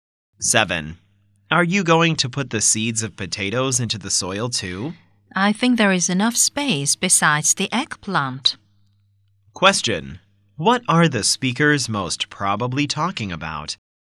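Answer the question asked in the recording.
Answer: Planting vegetables in the garden.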